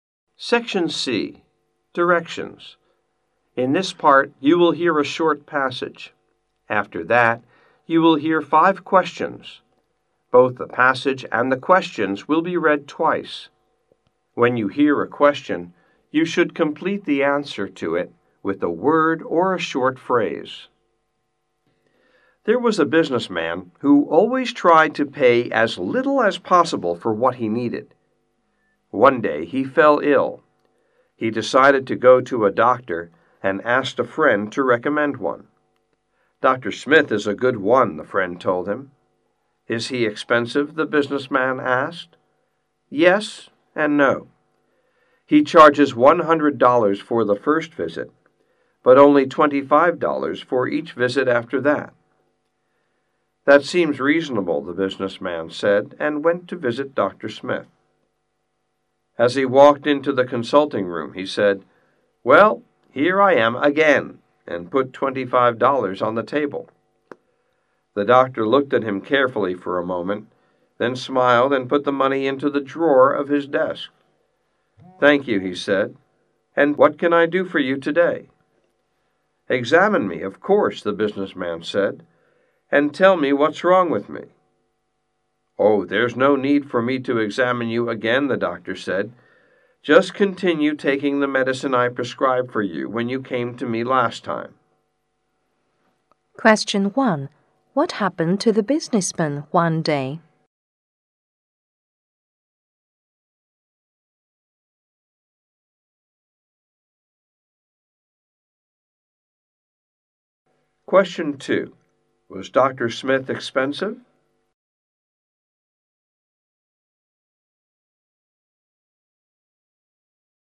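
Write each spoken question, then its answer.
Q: What happened to the businessman one day?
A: He fell ill

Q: Was Dr. Smith expensive?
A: Yes and no: $100 for the first visit, $25 for each later visit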